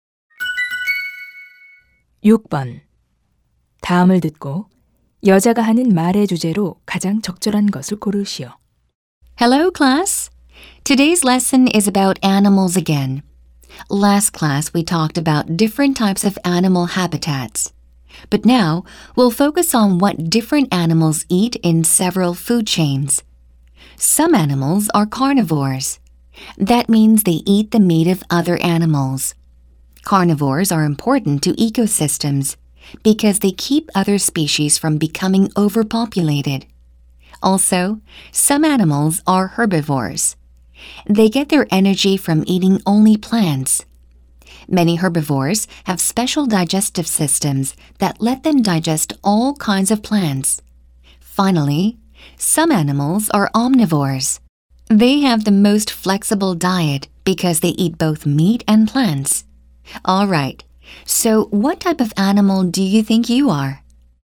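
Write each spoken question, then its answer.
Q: 다음을 듣고 여자가 하는 말의 주제로 가장 적절한 것을 고르시오.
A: 먹이에 따른 동물의 유형(육식, 초식, 잡식 동물)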